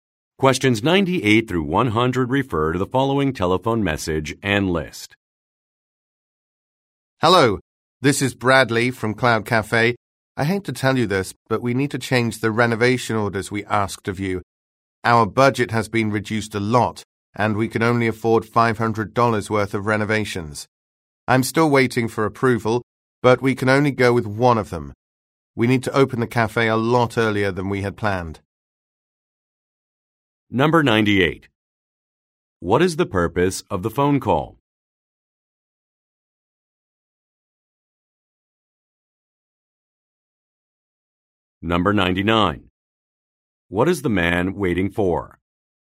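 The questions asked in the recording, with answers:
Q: What is the purpose of the phone call?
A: To change the renovation orders

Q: What is the man waiting for?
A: Approval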